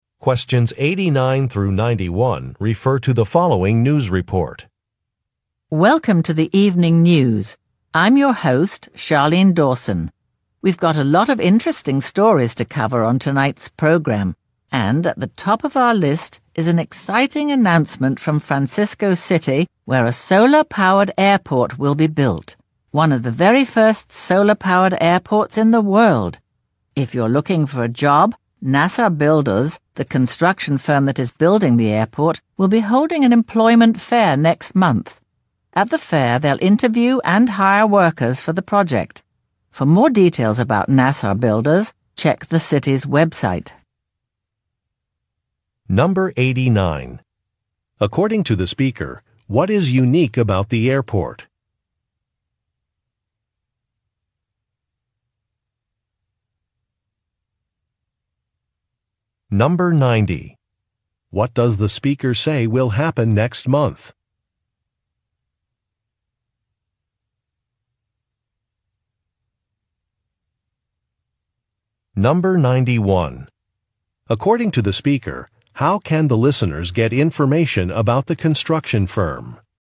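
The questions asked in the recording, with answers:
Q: According to the speaker, what is unique about the airport?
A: It will be solar-powered.

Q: What does the speaker say will happen next month?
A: An employment fair will be held.

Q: According to the speaker, how can the listeners get information about the construction firm?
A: By checking the city's website.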